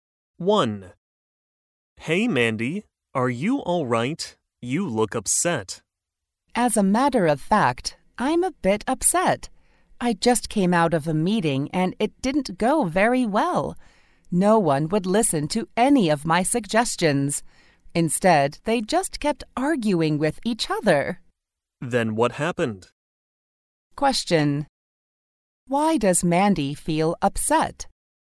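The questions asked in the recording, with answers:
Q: Why does Mandy feel upset?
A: Her meeting went badly: no one would listen to her suggestions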